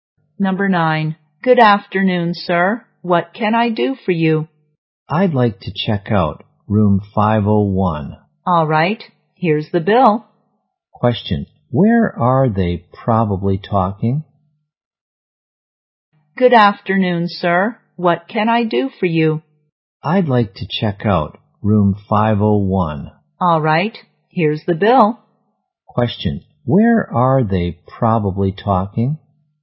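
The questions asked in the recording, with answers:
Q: Question. Where are they probably talking?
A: In a hotel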